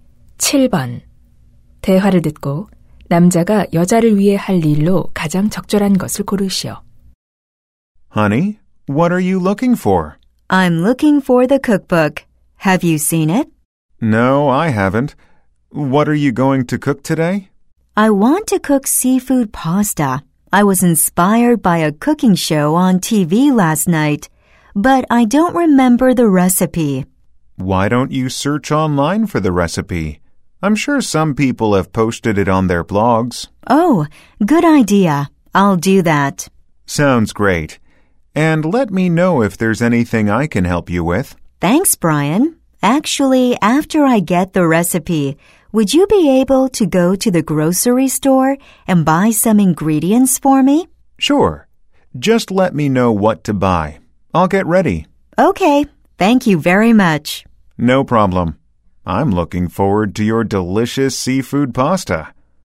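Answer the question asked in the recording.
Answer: 식료품점에 가서 재료 사 오기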